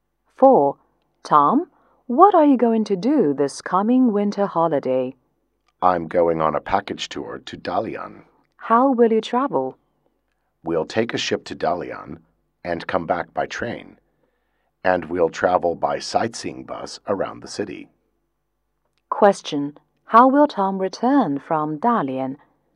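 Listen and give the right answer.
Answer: By train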